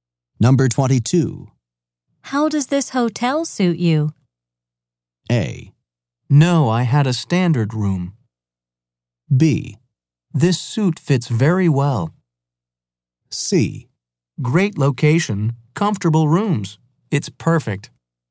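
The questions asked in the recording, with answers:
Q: How does this hotel suit you?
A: C: Great location, comfortable rooms. It's perfect.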